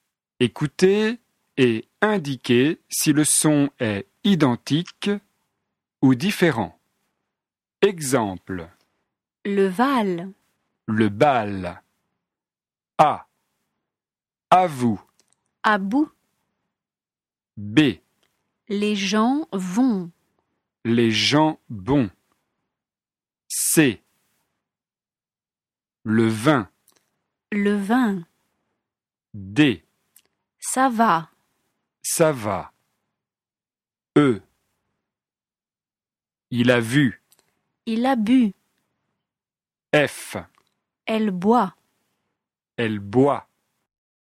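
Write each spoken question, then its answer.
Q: À vous. À bout.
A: différent

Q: Les gens vont. Les gens vont.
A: identique

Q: Le vin. Le vin.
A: identique

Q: Ça va. Ça va.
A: identique

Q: Il a vu. Il a bu.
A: différent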